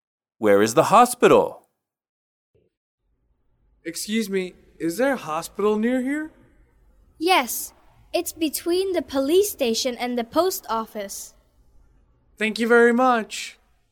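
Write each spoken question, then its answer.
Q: Where is the hospital?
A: Between the police station and the post office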